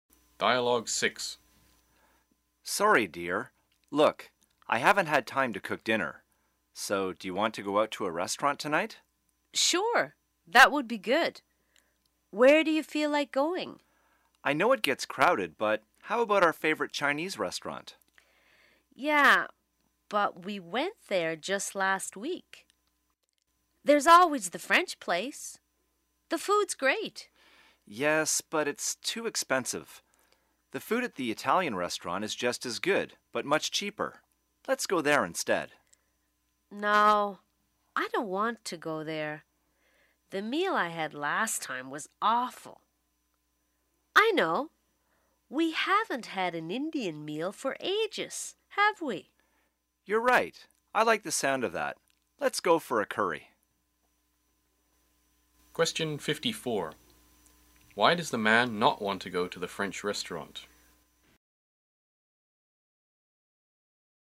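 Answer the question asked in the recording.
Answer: It is too expensive.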